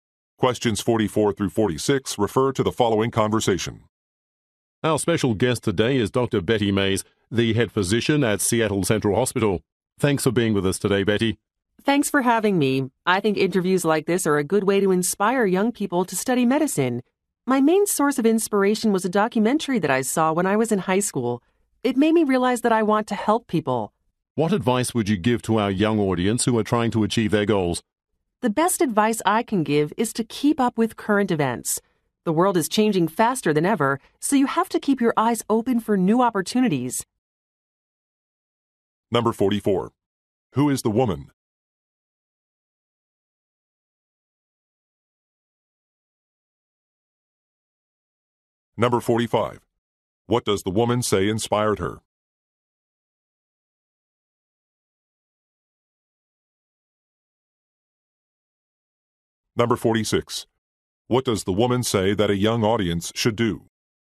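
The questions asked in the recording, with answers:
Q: Who is the woman?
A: A physician (head physician at a hospital)

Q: What does the woman say inspired her?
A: A documentary she saw in high school

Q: What does the woman say that a young audience should do?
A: Keep up with current events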